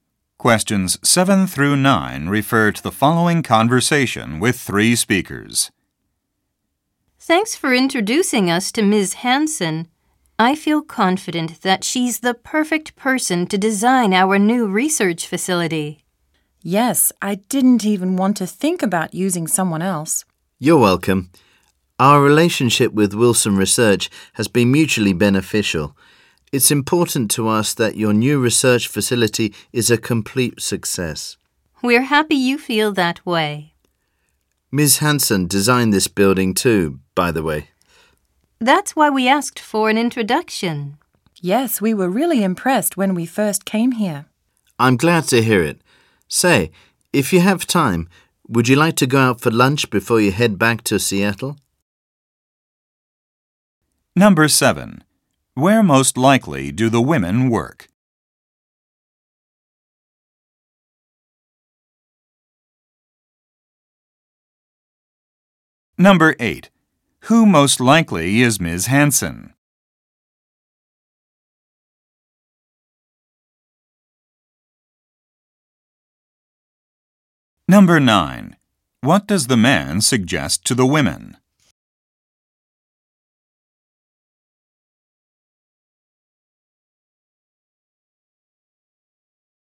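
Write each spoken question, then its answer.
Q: Who most likely is Ms.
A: An architect or building designer

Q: What does the man suggest to the women?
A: Going out for lunch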